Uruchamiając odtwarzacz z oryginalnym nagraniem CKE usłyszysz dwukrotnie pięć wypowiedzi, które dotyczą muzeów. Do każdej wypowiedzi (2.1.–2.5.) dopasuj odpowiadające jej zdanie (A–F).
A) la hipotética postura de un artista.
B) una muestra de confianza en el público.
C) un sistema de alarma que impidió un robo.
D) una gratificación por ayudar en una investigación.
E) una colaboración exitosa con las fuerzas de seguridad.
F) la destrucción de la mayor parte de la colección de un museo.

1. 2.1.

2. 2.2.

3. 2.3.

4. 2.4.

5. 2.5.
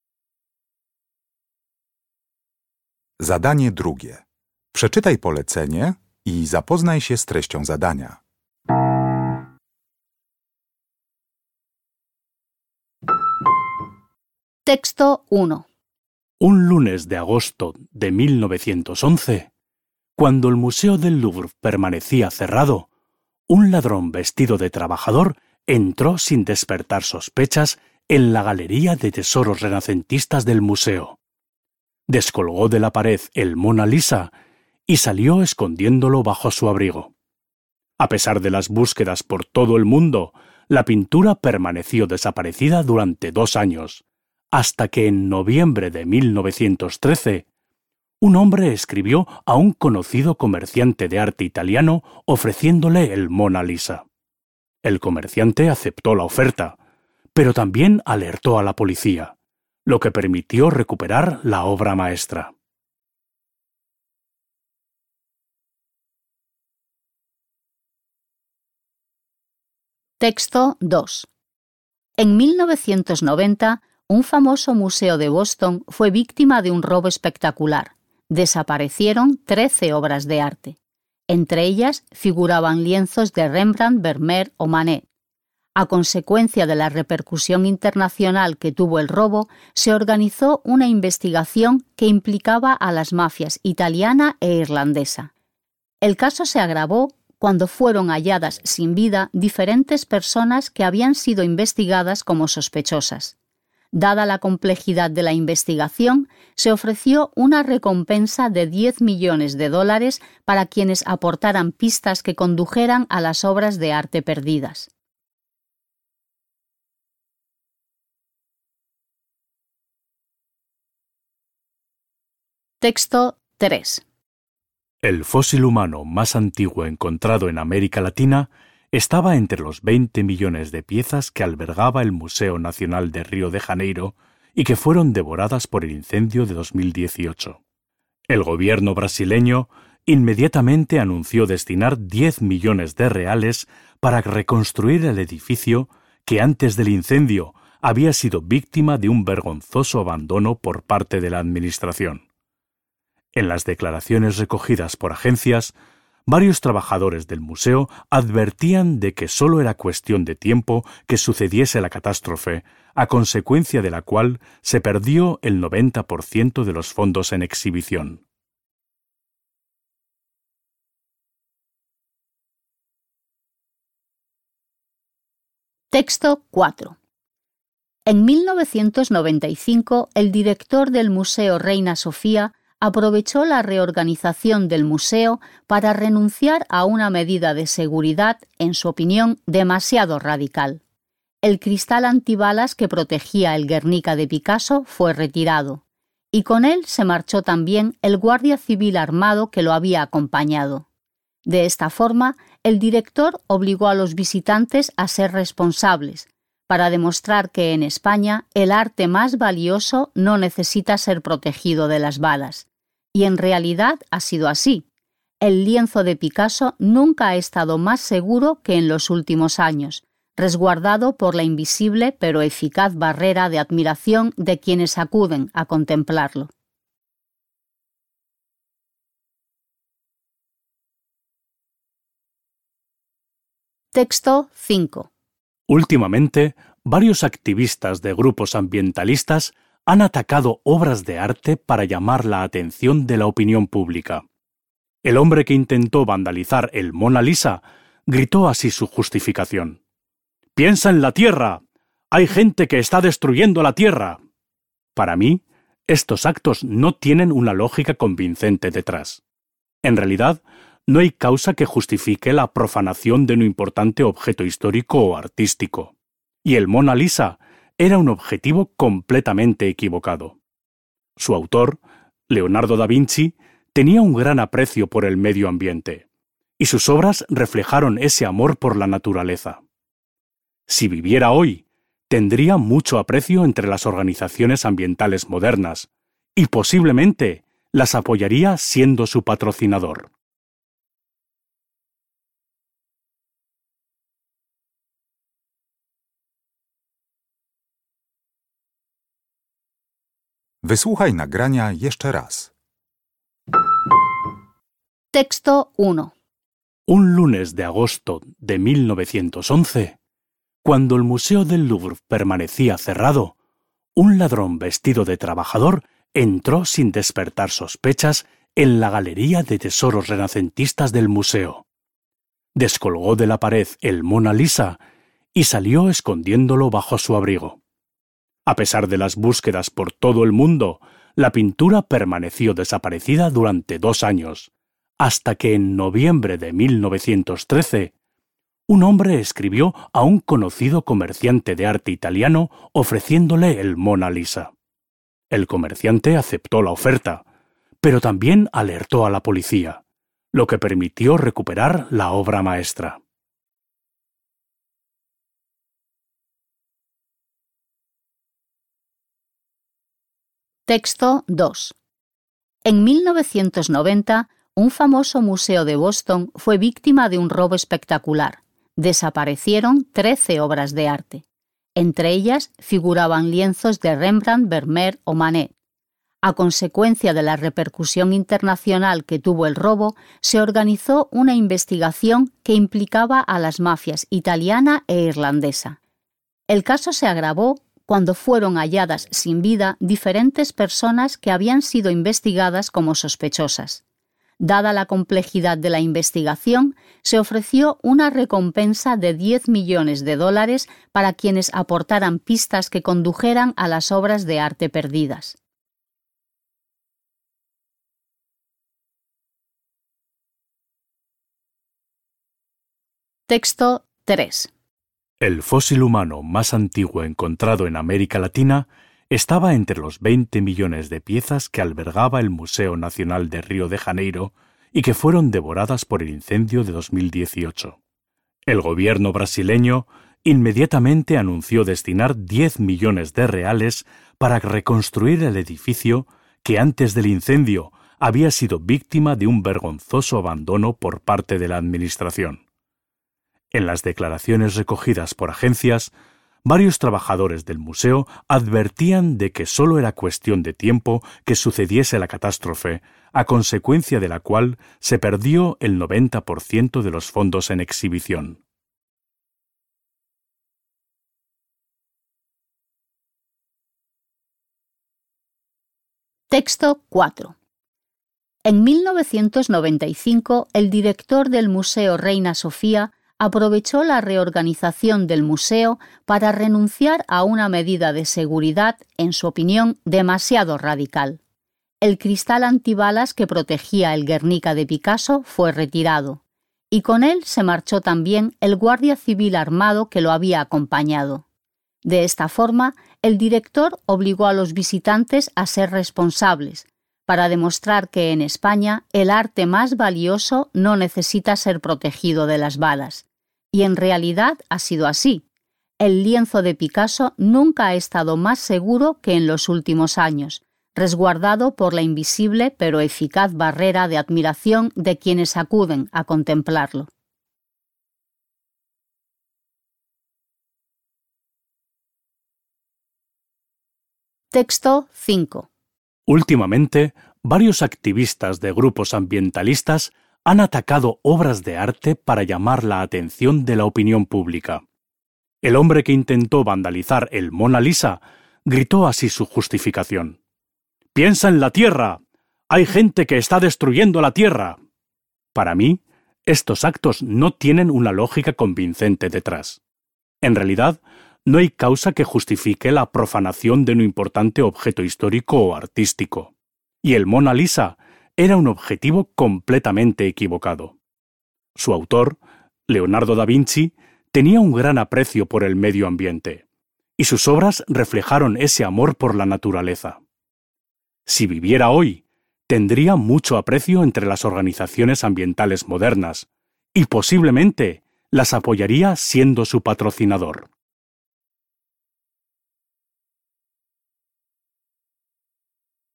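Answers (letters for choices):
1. E
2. D
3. F
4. B
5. A

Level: Poziom: rozszerzony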